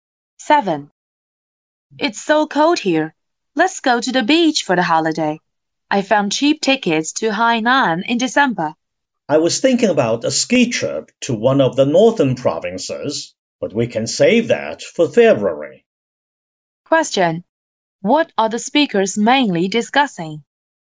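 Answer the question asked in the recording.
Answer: Holiday travel plans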